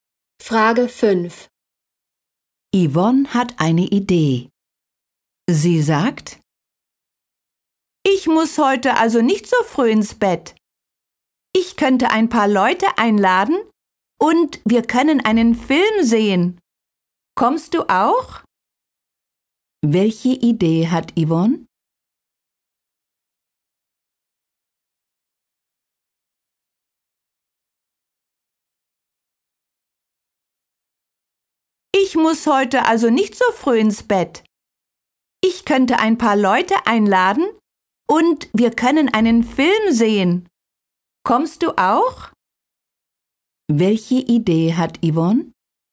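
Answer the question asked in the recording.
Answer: Freunde einladen und einen Film sehen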